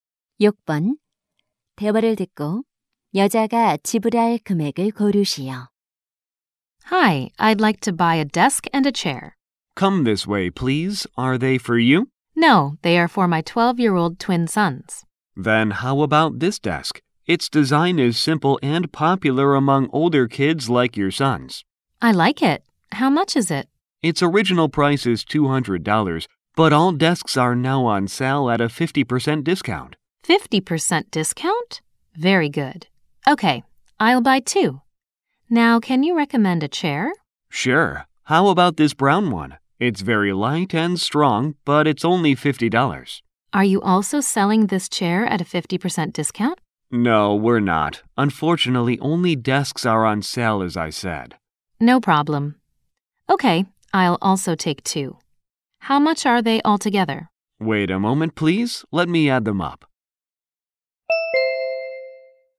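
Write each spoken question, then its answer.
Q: 대화를 듣고 여자가 지불할 금액을 고르시오.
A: $300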